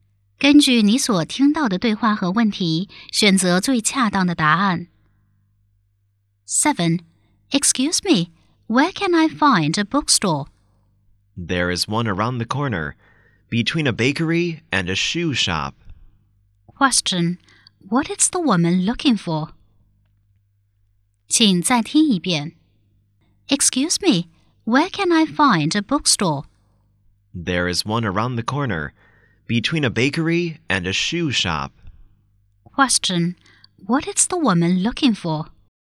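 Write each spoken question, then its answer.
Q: Question, what is the woman looking for?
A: A bookstore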